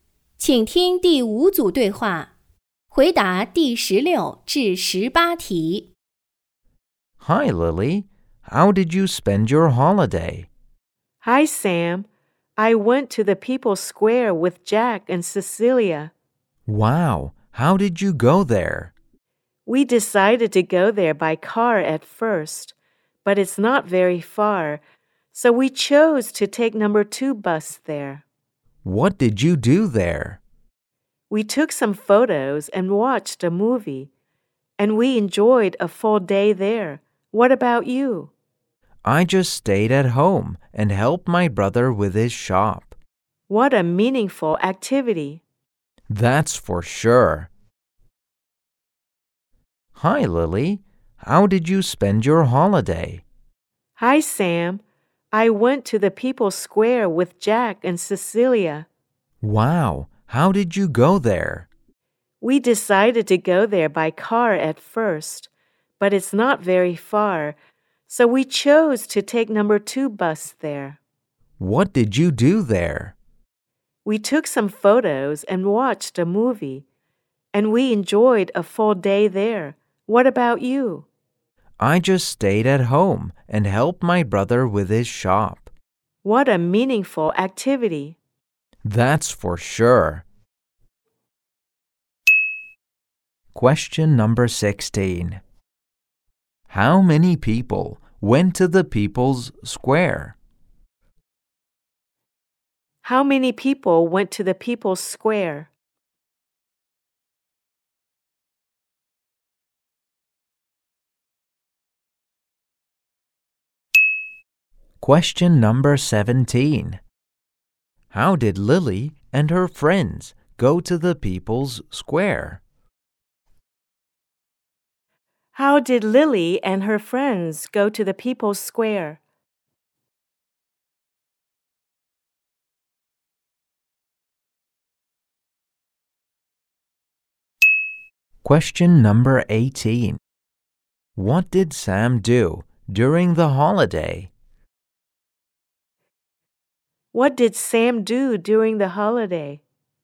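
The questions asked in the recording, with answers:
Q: How many people went to the People's Square?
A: Three

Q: How did Lily and her friends go to the People's Square?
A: By bus

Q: What did Sam do during the holiday?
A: He stayed at home and helped his brother with his shop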